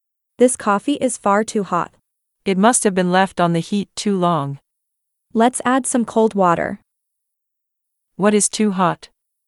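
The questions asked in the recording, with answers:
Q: What is too hot?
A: the coffee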